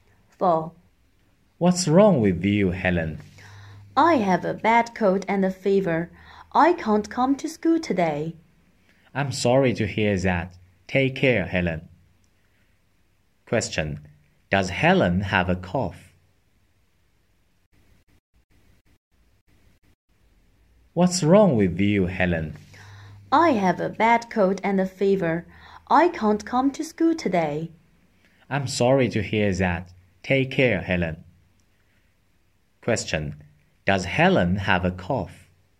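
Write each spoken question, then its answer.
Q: Does Helen have a cough?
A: No, she has a bad cold and a fever.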